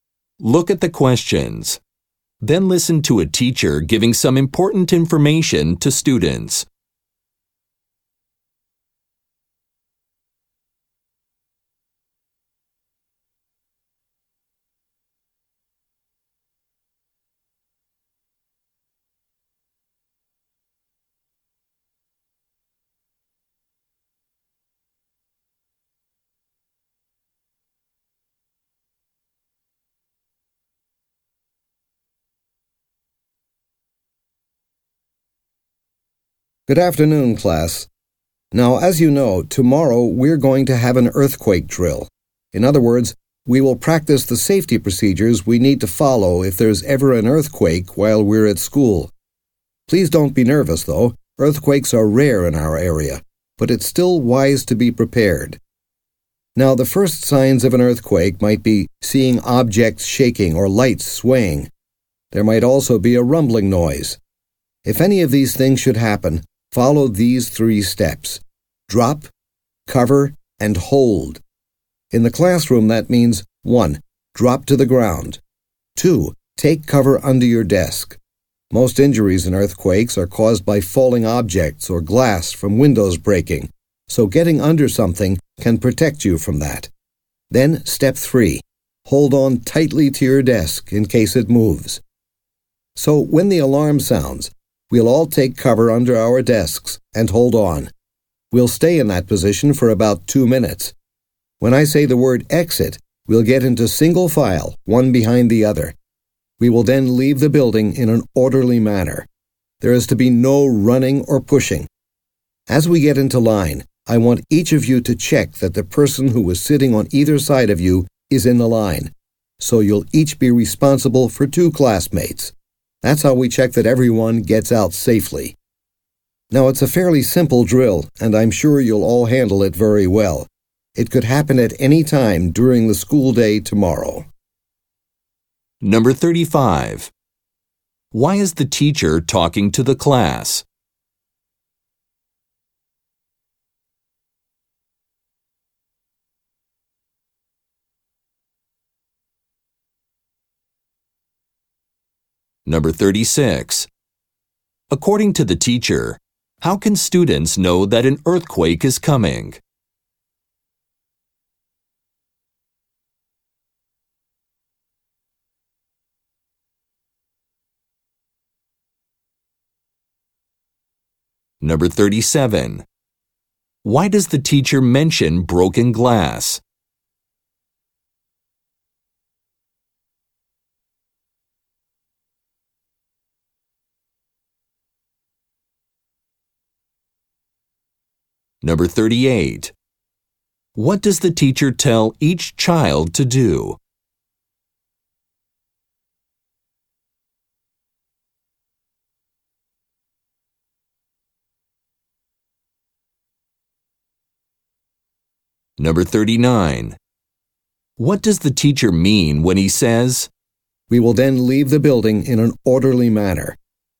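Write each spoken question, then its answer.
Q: Why is the teacher talking to the class?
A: To explain tomorrow's earthquake drill

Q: According to the teacher, how can students know that an earthquake is coming?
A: Objects shaking, lights swaying, or a rumbling noise

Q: Why does the teacher mention broken glass?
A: To explain why students should take cover under their desks

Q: What does the teacher tell each child to do?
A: Check that the classmates who sat on either side of them are in the line

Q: What does the teacher mean when he says,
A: They will leave calmly in single file, without running or pushing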